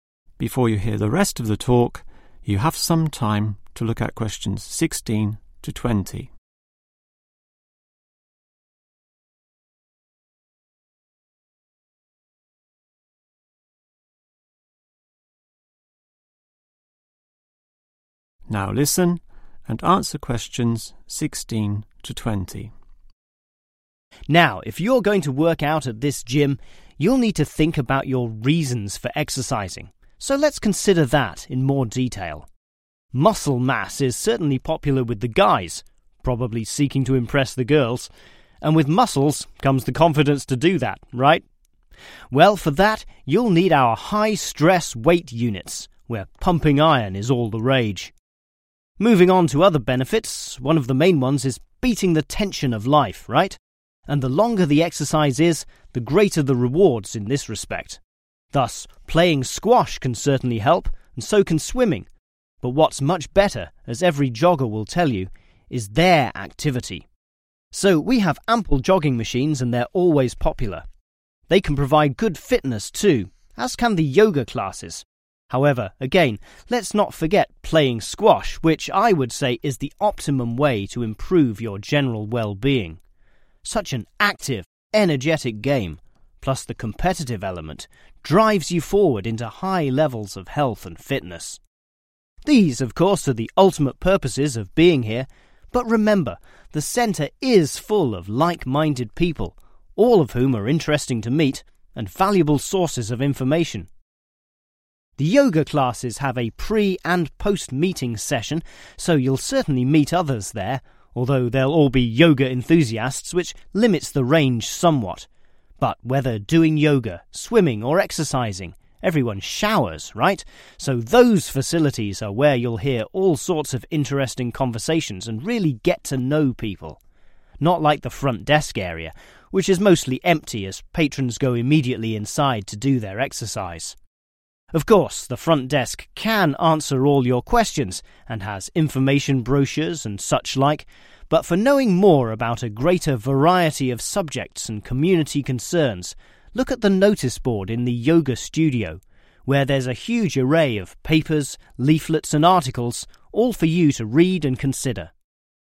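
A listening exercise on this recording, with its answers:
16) developing confidence?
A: Weight units

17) reducing stress?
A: jogging machines

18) building fitness?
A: Squash courts

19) meeting others?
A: Shower blocks

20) finding information?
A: Yoga studio

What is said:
Now, if you're going to work out at this gym. you'll need to think about your reasons for exercising, so let's consider that in more 15 . Muscle mass is certainly popular with the guys, probably seeking, to impress the girls, and with muscles comes the confidence to do that, right? Well, for that, you'll need our high-stress weight units, where pumping iron is all the rage. Moving, on to other benefits, one of the main ones is beating the 16 of life, right, and the longer the exercise is, the greater the rewards in this respect. Thus, playing squash can certainly help, and so can swimming, but what's much better, as every 17 will tell you, is their activity, so we have ample jogging machines, and they're always popular. 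They can provide good fitness too, as can the yoga classes; however, again, let's not forget playing squash, which, I would say, is the 18 way to improve your general well-being. Such an active, energetic game, plus the 19 element, drives you forward into high levels of health and fitness. These, of course, are the 20 purposes of being here, but remember, the centre is full of like- minded people, all of whom are interesting to meet, and valuable sources of information.
The yoga classes have a pre- and post-meeting session, so you'll certainly meet others there, although they'll all be yoga 21 , which limits the range somewhat. But whether doing yoga, swimming, or exercising, everyone showers, right, so those facilities are where you'll hear all sorts of interesting 22 , and really get to know people —not like the front-desk area, which is mostly empty as patrons go immediately inside to do their exercise. 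Of course, the front desk can answer all your questions, and has information 23 , and such like, but for knowing more about a greater variety of subjects and community 24 , look at the notice board in the yoga studio, where there's a huge array of papers, 25 , and articles, all for you to read and consider.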